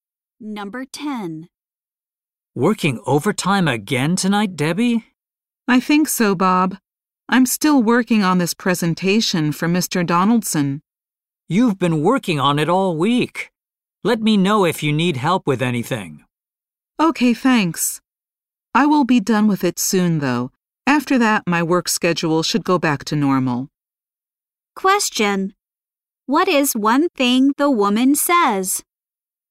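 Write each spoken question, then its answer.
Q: What is one thing the woman says?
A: She will finish the presentation soon and her schedule will return to normal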